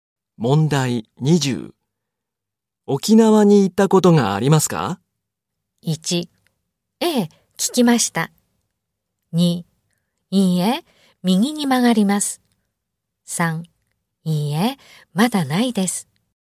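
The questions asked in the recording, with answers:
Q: 沖縄に行ったことがありますか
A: 3: いいえ、まだないです。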